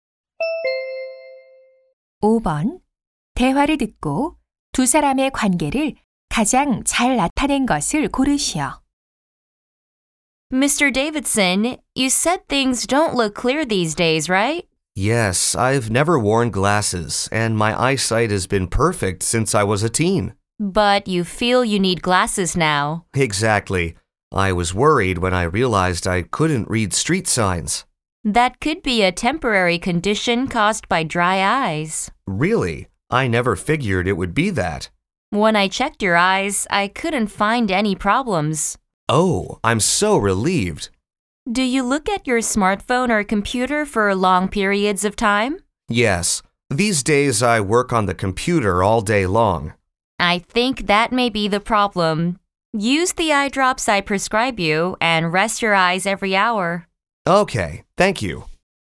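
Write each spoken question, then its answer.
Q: 대화를 듣고 두 사람의 관계를 가장 잘 나타낸 것을 고르시오.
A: 안과 의사와 환자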